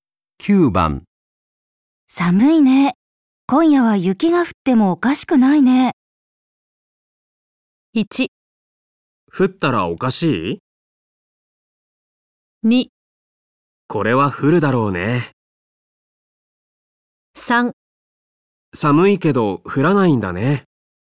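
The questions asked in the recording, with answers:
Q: 寒いね。今夜は雪が降ってもおかしくないね。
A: 2: これは降るだろうね。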